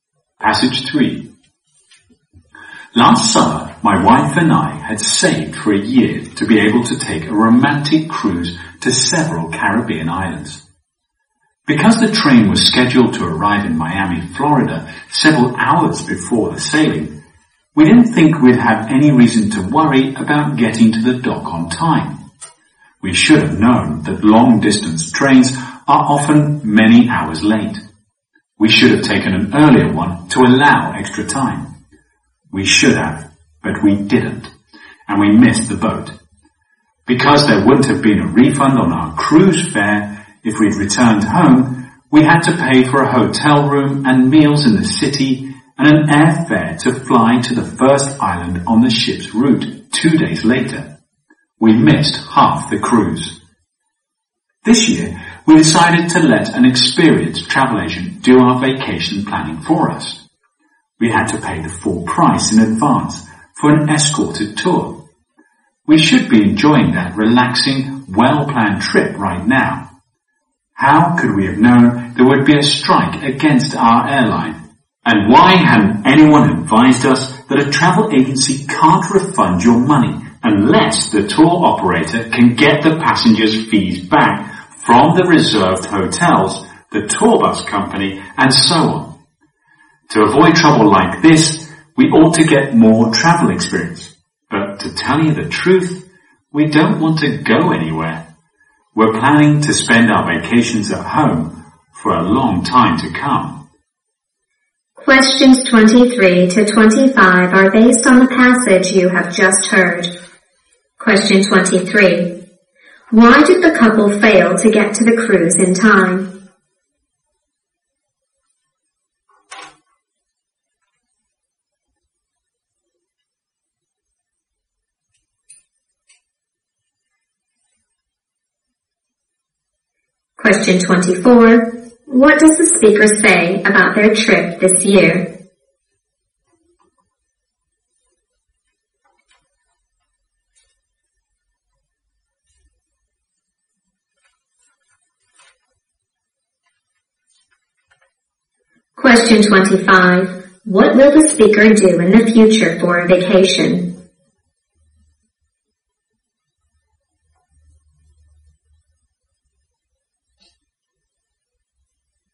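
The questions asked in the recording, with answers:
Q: Why did the couple fail to get to the cruise in time?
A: Their train was late.

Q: What does the speaker say about their trip this year?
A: An airline strike ruined it, and they could not get their money back.

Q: What will the speaker do in the future for a vacation?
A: Stay at home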